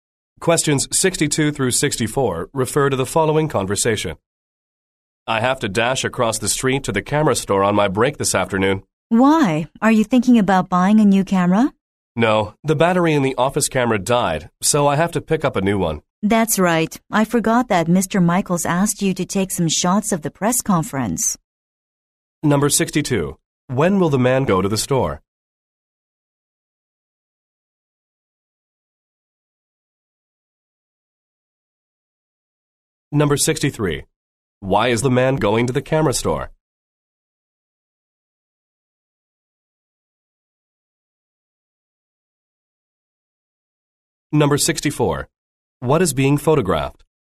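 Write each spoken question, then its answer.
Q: When will the man go to the store?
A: On his break this afternoon

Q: Why is the man going to the camera store?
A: To buy a new battery for the office camera

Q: What is being photographed?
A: A press conference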